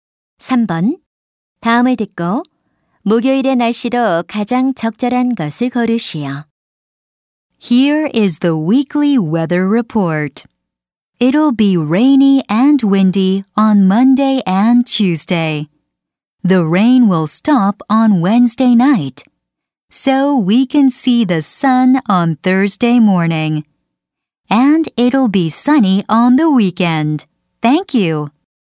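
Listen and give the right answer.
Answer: 맑음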